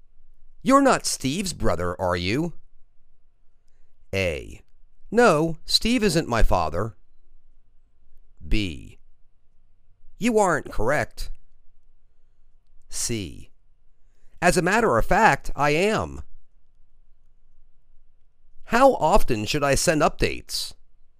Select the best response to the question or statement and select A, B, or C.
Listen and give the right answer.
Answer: As a matter of fact, I am.